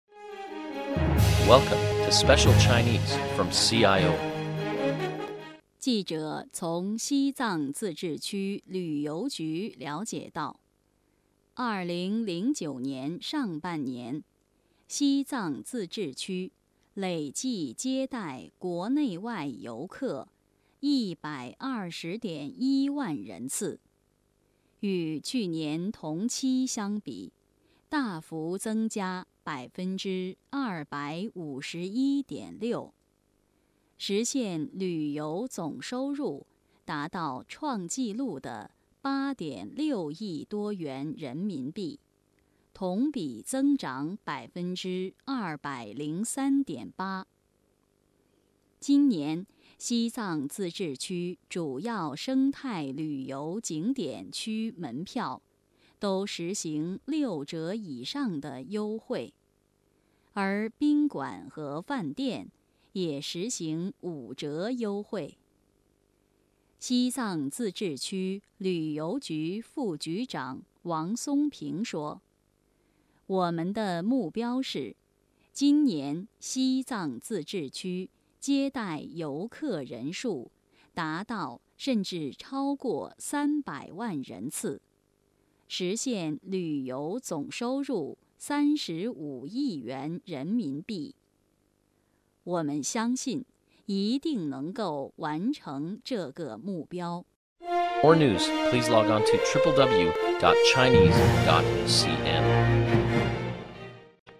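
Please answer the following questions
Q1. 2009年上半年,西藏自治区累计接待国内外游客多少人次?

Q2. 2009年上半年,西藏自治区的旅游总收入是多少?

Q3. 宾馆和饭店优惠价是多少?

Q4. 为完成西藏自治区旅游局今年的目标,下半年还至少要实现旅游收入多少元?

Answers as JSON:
{"1": "120.1万人次", "2": "8.6亿多元人民币", "3": "5折", "4": "约26.4亿元人民币(35亿减8.6亿多)"}

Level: M.Phil Year 2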